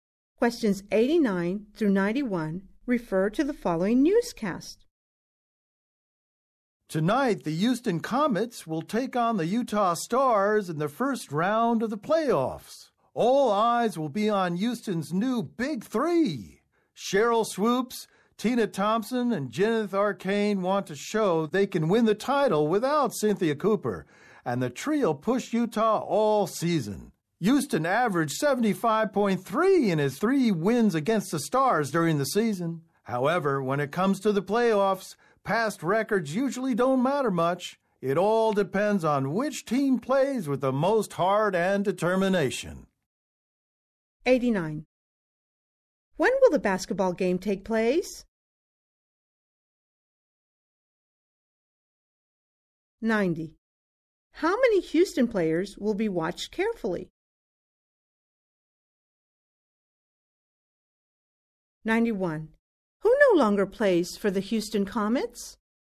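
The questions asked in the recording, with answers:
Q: When will the basketball game take place?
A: Tonight

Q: How many Houston players will be watched carefully?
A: Three

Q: Who no longer plays for the Houston Comets?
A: Cynthia Cooper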